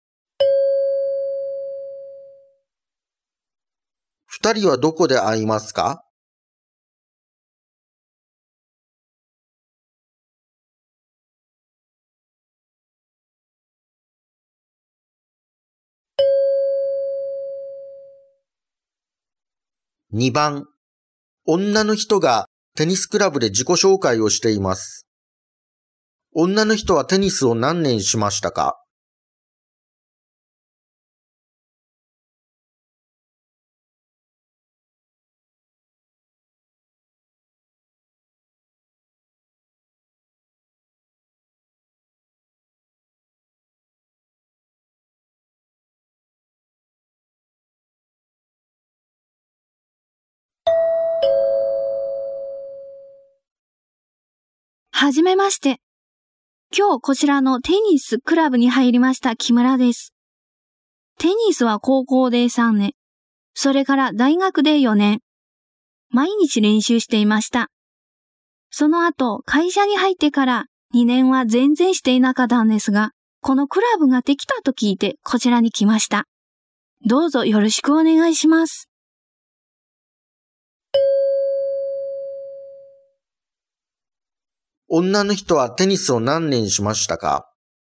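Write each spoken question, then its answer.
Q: 女の人はテニスを何年しましたか?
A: 7年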